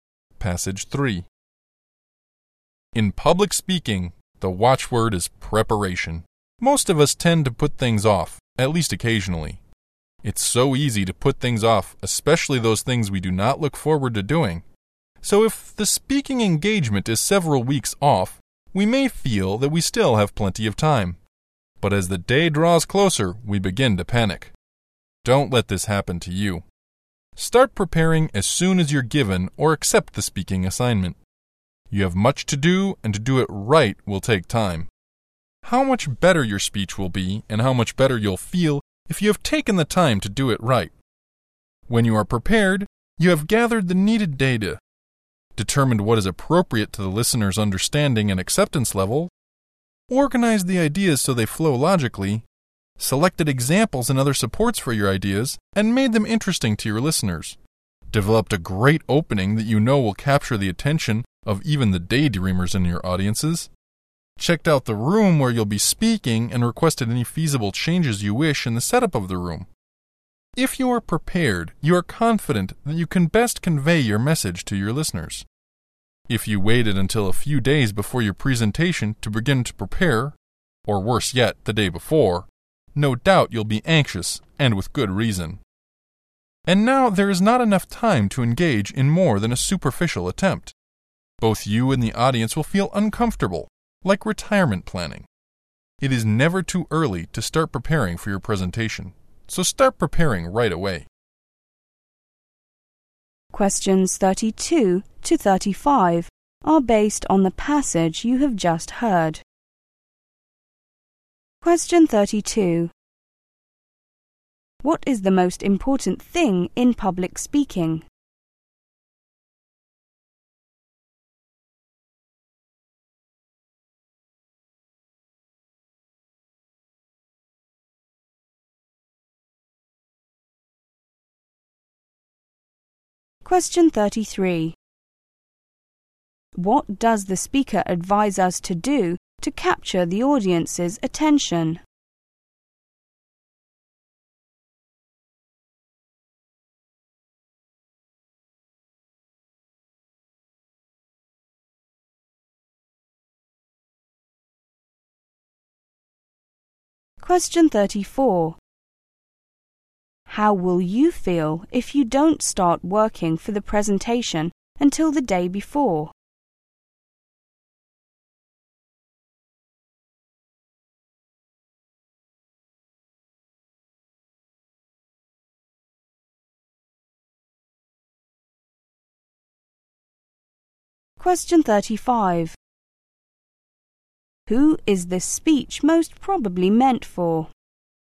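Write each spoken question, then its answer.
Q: What is the most important thing in public speaking?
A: Preparation

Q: What does the speaker advise us to do to capture the audience's attention?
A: Develop a great opening

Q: How will you feel if you don't start working for the presentation until the day before?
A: Anxious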